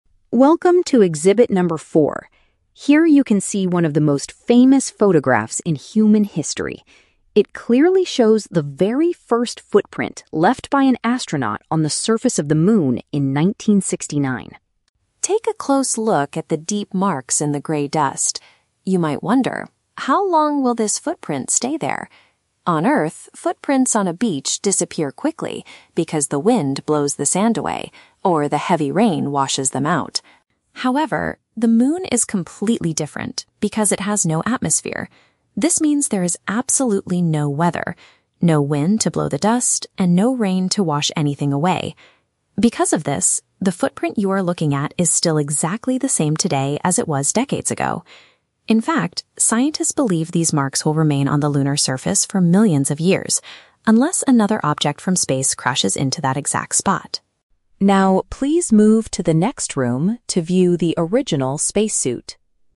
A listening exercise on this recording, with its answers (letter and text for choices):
Listen to an audio guide in a space museum and choose the correct answer (A, B, or C) for each question.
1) What are the visitors looking at in this section of the museum?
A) The actual grey dirt brought back from the Moon.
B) A picture showing a mark made by a space explorer.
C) A famous outfit worn by a person in 1969.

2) According to the guide, why do footprints disappear easily on our planet?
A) Because natural weather conditions destroy them.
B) Because people usually walk near the ocean water.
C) Because the strong gravity pulls the sand down.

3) What is the only thing that could destroy the marks on the Moon?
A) A massive storm that happens once in a million years.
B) Future travelers stepping over the exact same area.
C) Something else from the universe hitting that location.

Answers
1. B) A picture showing a mark made by a space explorer.
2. A) Because natural weather conditions destroy them.
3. C) Something else from the universe hitting that location.

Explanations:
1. The narrator says visitors can see a "photograph" showing the "first footprint left by an astronaut." Option (B) uses paraphrasing ("picture" = photograph, "mark" = footprint, "space explorer" = astronaut). Option (A) is a trap; "grey dust" is mentioned in the audio, but the visitors are looking at a photo of it, not the actual dirt. Option (C) is a trap; the "spacesuit" (outfit) is mentioned at the very end, but it is in the next room, not this section.
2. The script explains that on Earth, "the wind blows the sand away, or the heavy rain washes them out." Wind and rain are weather conditions. Option (A) accurately paraphrases this idea. Option (B) is a trap; a "beach" is mentioned as an example, but people walking near the water is not the reason given for the footprints disappearing. Option (C) is a plausible scientific guess, but gravity is never mentioned.
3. The narrator states the footprints will remain "unless another object from space crashes into that exact spot." Option (C) perfectly paraphrases this exception ("Something else from the universe" = another object from space, "hitting that location" = crashes into that exact spot). Option (A) is a trap; "millions of years" is mentioned, but the audio explicitly says the Moon has "absolutely no weather" (no storms). Option (B) is a logical thought but is never stated in the script.

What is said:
Audio Guide Narrator: Welcome to Exhibit number 4. Here you can see one of the most famous photographs in human history. It clearly shows the very first footprint left by an astronaut on the surface of the Moon in 1969.
Take a close look at the deep marks in the grey dust. You might wonder, how long will this footprint stay there? On Earth, footprints on a beach disappear quickly because the wind blows the sand away, or the heavy rain washes them out.
However, the Moon is completely different because it has no atmosphere. This means there is absolutely no weather—no wind to blow the dust, and no rain to wash anything away. Because of this, the footprint you are looking at is still exactly the same today as it was decades ago. In fact, scientists believe these marks will remain on the lunar surface for millions of years, unless another object from space crashes into that exact spot.
Now, please move to the next room to view the original spacesuit.